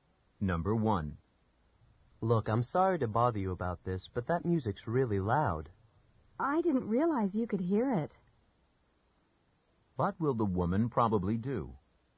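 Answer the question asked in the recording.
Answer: Turn the music down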